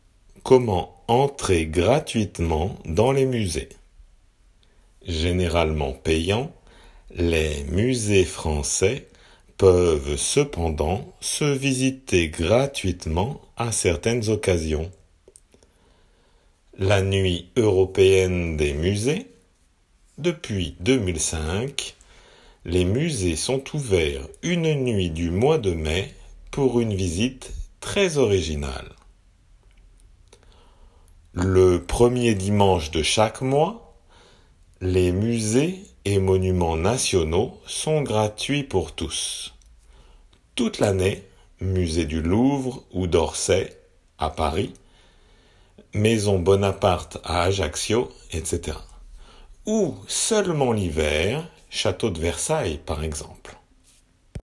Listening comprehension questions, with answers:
Écoutez bien et indiquez si les phrases suivantes sont vraies ou fausses.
La Nuit des musées a lieu en mai.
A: 〇

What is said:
Comment entrer gratuitement dans les musées ?
Généralement payants les musées français peuvent cependant se visiter gratuitement à certaines occasions :
La Nuit Européenne des musées : depuis 2005, les musées sont ouverts une nuit du mois de mai, pour une visite très originale.
Le premier dimanche de chaque mois, les musées et monuments nationaux sont gratuits pour tous, toute l'année (musées du Louvre ou d'Orsay à Paris, maison Bonaparte à Ajaccio, etc.) ou seulement l'hiver (château de Versailles par exemple).